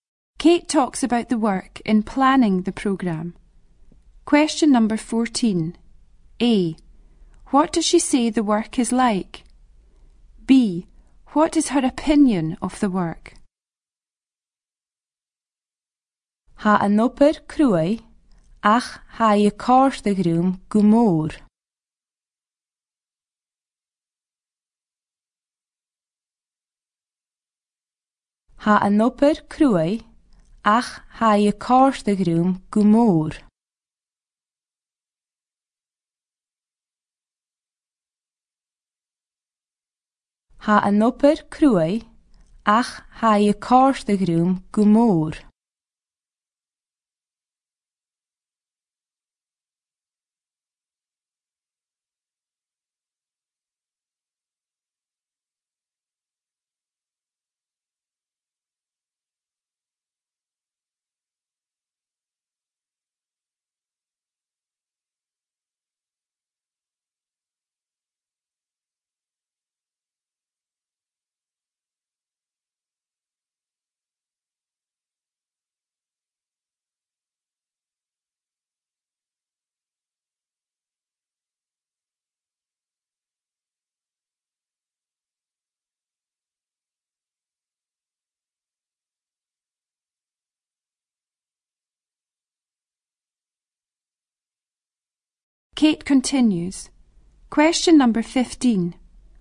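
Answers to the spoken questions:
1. Hard
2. She enjoys it a lot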